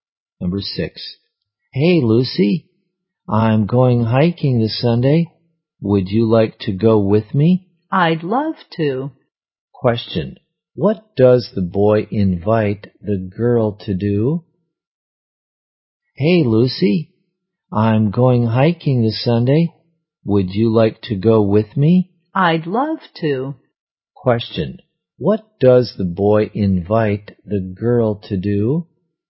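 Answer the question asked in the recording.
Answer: To go hiking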